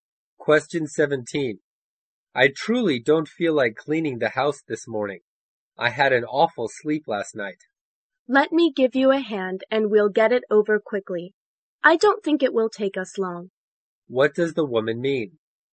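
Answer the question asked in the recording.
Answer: She will help him clean the house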